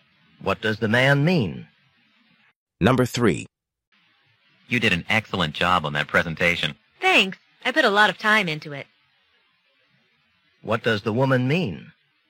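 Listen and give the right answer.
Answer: She worked hard on the presentation.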